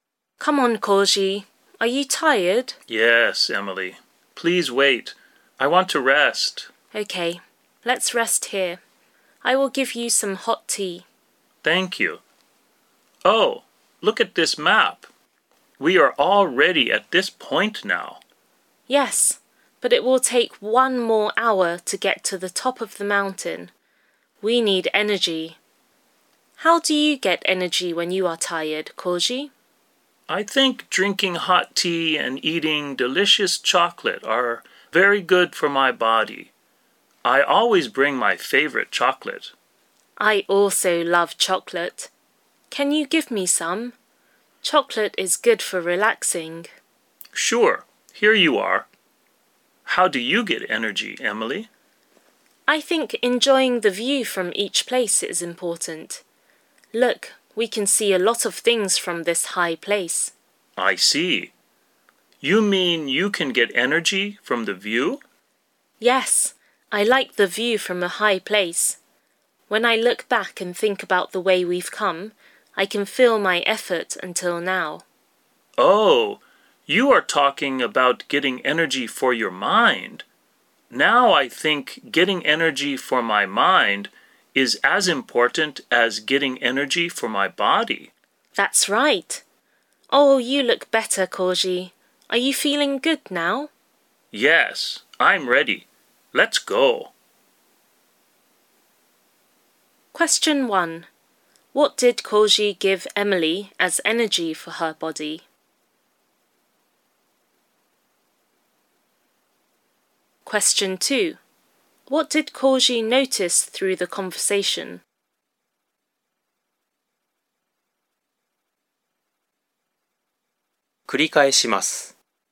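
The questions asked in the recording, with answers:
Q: What did Koji give Emily as energy for her body?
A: Chocolate

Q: What did Koji notice through the conversation?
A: Getting energy for the mind is as important as getting energy for the body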